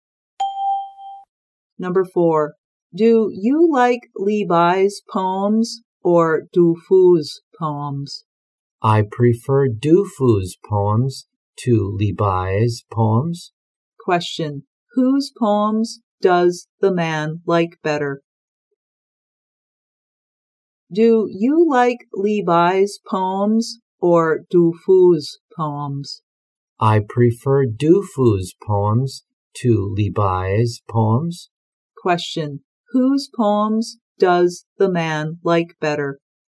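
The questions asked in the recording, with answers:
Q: Whose poems does the man like better?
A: Du Fu's poems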